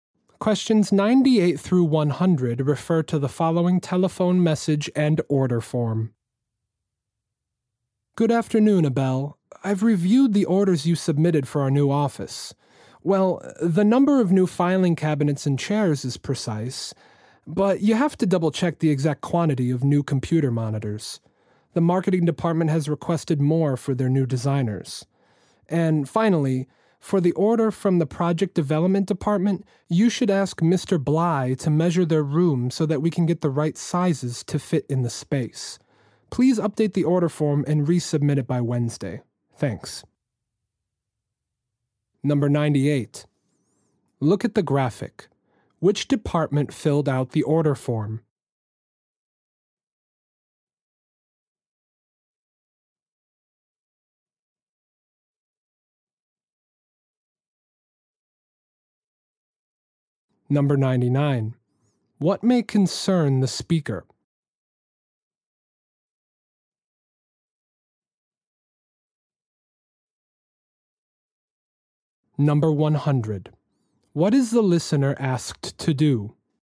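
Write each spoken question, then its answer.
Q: What is the listener asked to do?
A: Update the order form and resubmit it by Wednesday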